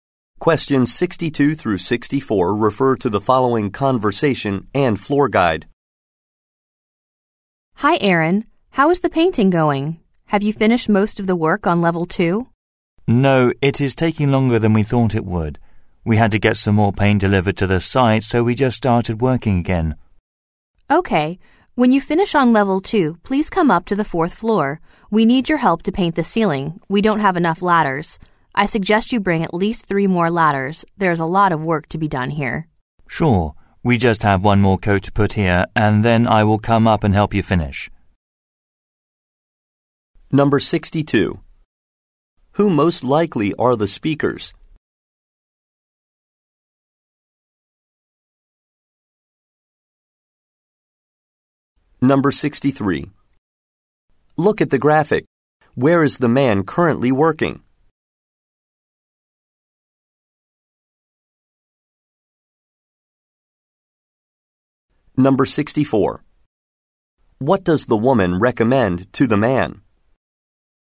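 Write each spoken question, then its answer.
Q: Who most likely are the speakers?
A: Painters

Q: What does the woman recommend to the man?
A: Bringing at least 3 more ladders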